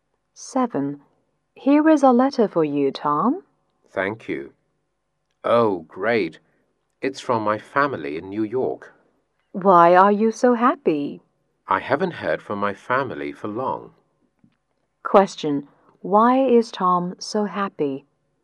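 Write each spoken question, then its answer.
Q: Why is Tom so happy?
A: He got a letter from his family in New York, whom he hadn't heard from for long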